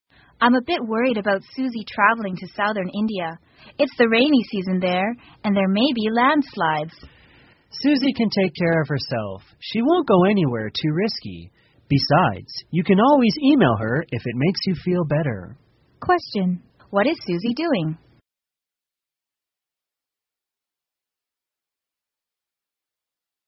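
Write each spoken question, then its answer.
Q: What is Susie doing?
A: Traveling in southern India.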